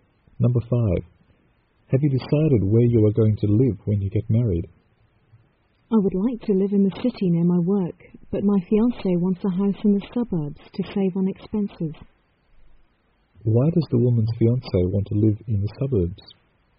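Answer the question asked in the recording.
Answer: To save on expenses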